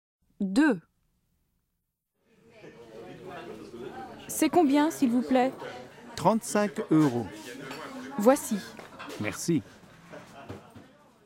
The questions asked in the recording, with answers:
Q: C'est combien, s'il vous plaît?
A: 35 euros.